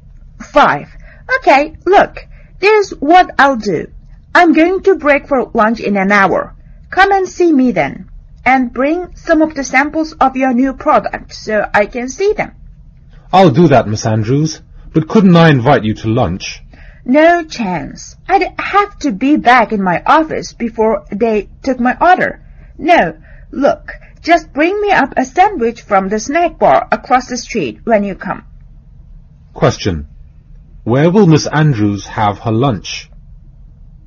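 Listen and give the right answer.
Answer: In her office (a sandwich)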